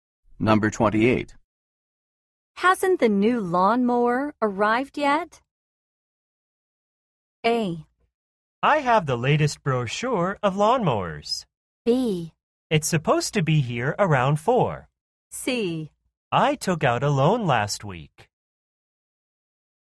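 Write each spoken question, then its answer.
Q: Hasn't the new lawnmower arrived yet?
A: B: It's supposed to be here around 4.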